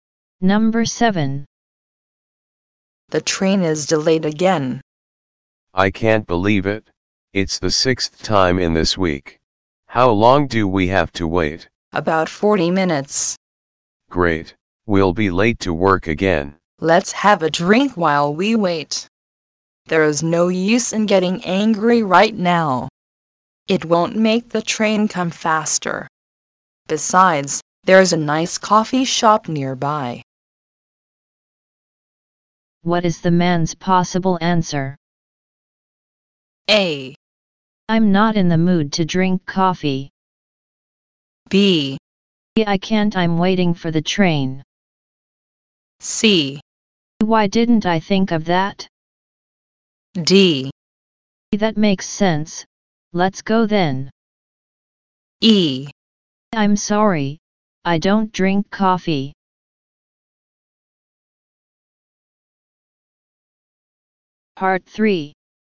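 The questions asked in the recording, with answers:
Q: What is the man's possible answer?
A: D: That makes sense. Let's go then.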